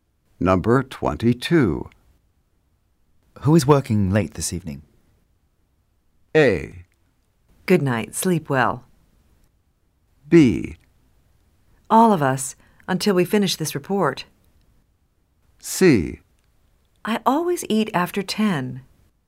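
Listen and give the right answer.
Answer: B: All of us, until we finish this report.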